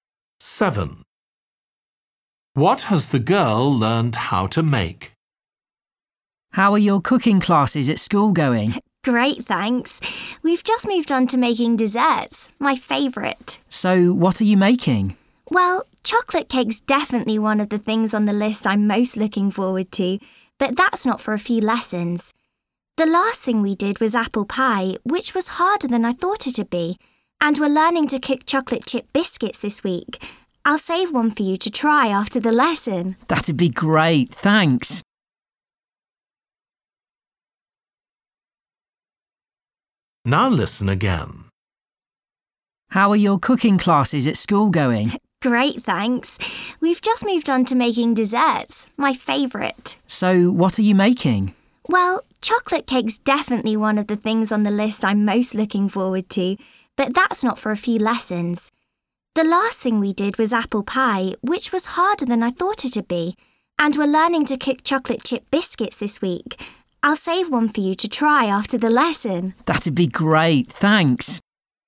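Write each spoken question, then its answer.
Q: What has the girl learned how to make?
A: apple pie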